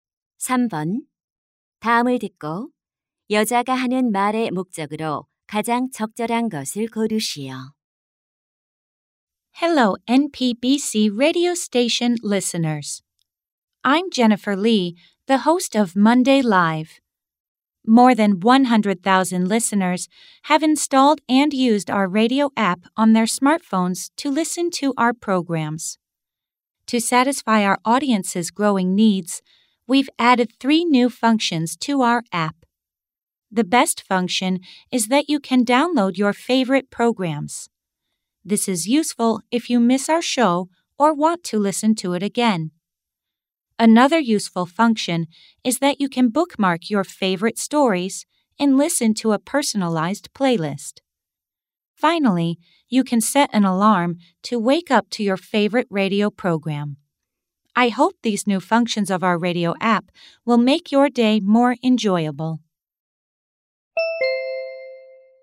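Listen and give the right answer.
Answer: 라디오 앱의 새로운 기능을 소개하려고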